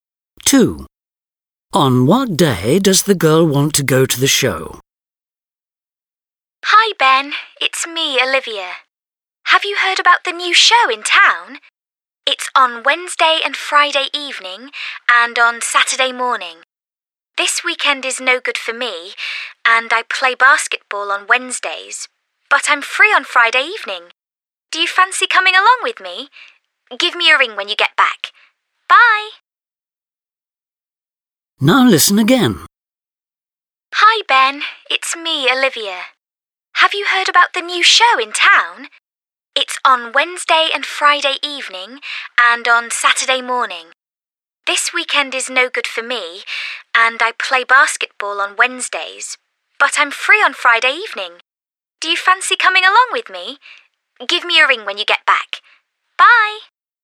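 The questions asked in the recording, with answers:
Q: On what day does the girl want to go to the show?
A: Friday (evening)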